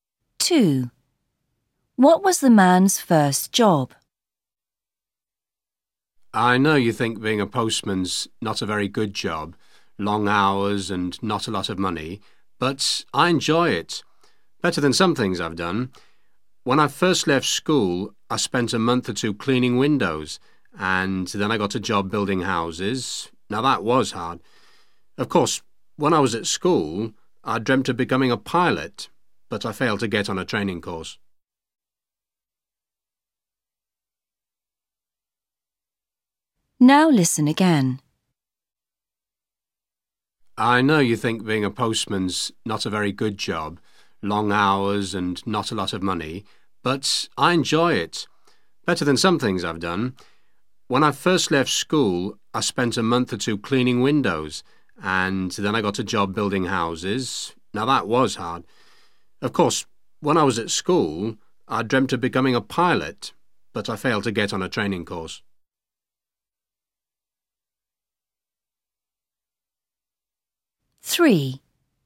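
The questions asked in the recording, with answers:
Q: What was the man's first job?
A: cleaning windows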